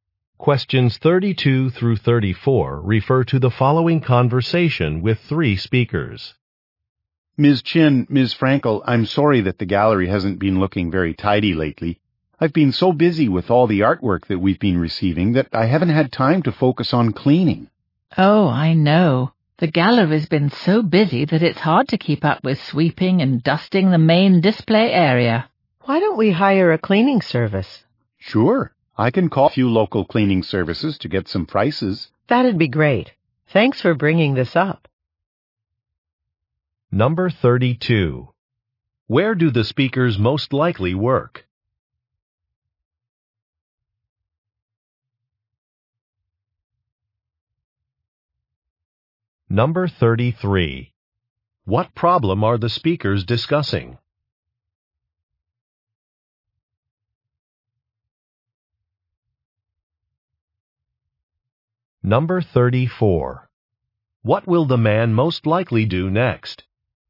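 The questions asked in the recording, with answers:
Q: Where do the speakers most likely work?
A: At an art gallery

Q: What problem are the speakers discussing?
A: The gallery has not been kept clean

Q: What will the man most likely do next?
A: Call cleaning services to get prices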